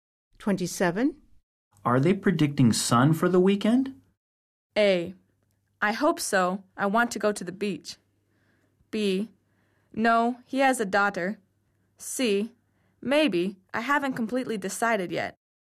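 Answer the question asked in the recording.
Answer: A: I hope so. I want to go to the beach.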